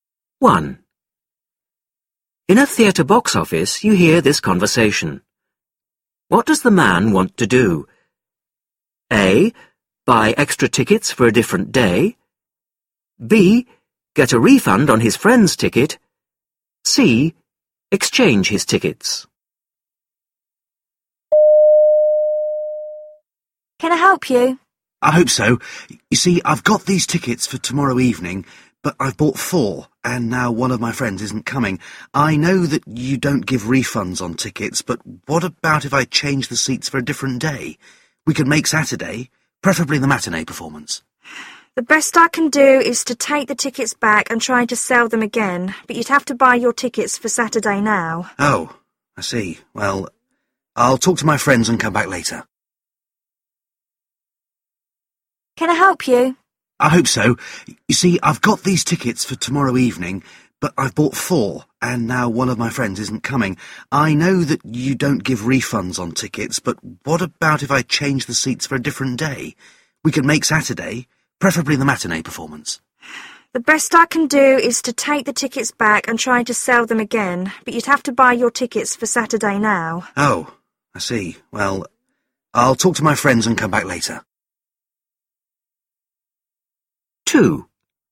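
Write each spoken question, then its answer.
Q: What does the man want to do?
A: C: Exchange his tickets.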